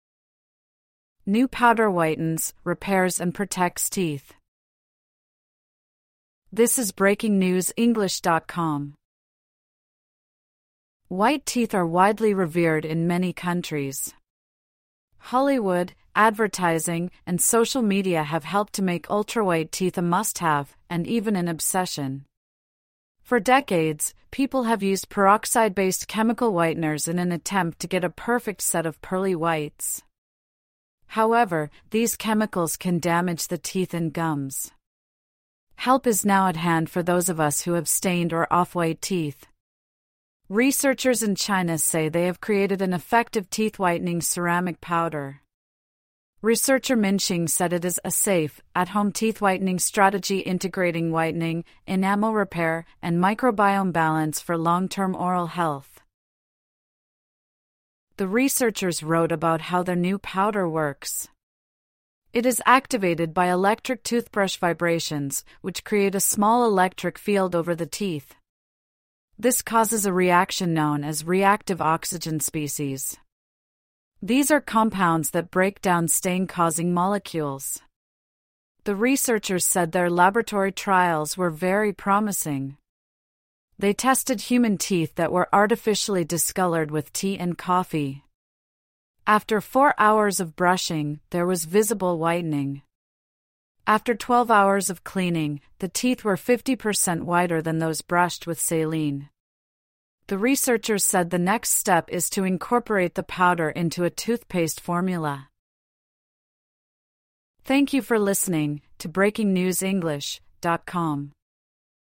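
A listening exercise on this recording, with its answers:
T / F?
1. The article says white teeth are unrivalled in many countries.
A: F

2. The article says white teeth are a must-have in many countries.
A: T

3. The article says teeth-whitening chemicals can strengthen our gums.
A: F

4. A researcher said the new powder can repair tooth enamel.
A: T

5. The powder reacts to vibrations from electric toothbrushes.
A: T

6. The powder attacks molecules that cause stains on our teeth.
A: T

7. Four hours of brushing with the powder resulted in visible whitening.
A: T

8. The powder is now in many toothpastes we can buy in stores.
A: F

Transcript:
New powder whitens, repairs and protects teeth
White teeth are widely revered in many countries. Hollywood, advertising, and social media have helped to make ultra-white teeth a must-have, and even an obsession. For decades, people have used peroxide-based chemical whiteners in an attempt to get a perfect set of "pearly whites". 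However, these chemicals can damage the teeth and gums. Help is now at hand for those of us who have stained or off-white teeth. Researchers in China say they have created an effective teeth-whitening ceramic powder. Researcher Min Xing said it is "a safe, at-home teeth-whitening strategy integrating whitening, enamel repair, and microbiome balance for long-term oral health".
The researchers wrote about how their new powder works. It is activated by electric toothbrush vibrations, which create a small electric field over the teeth. This causes a reaction known as "reactive oxygen species". These are compounds that break down stain-causing molecules. The researchers said their laboratory trials were very promising. They tested human teeth that were artificially discoloured with tea and coffee. After four hours of brushing, there was visible whitening. After 12 hours of cleaning, the teeth were 50 per cent whiter than those brushed with saline. 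The researchers said the next step is to incorporate the powder into a toothpaste formula.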